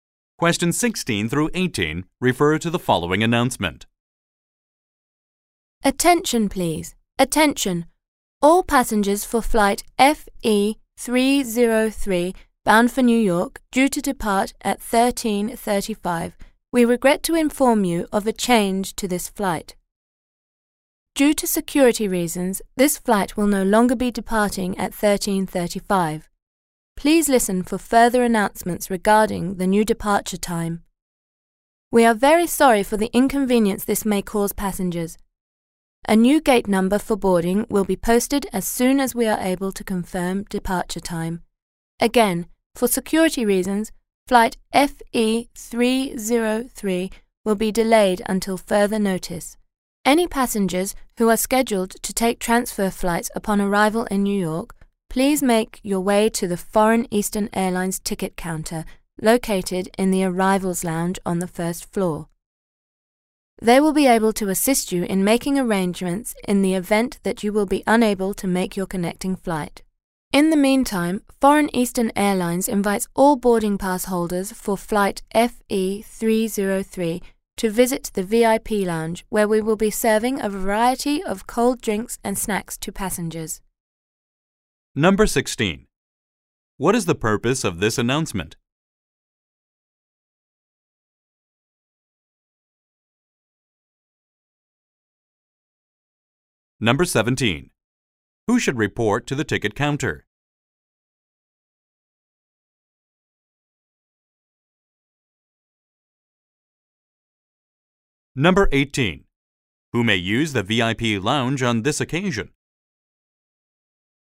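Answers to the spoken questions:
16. To announce that flight FE303 is delayed.
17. Passengers with transfer flights in New York.
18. All boarding pass holders for flight FE303.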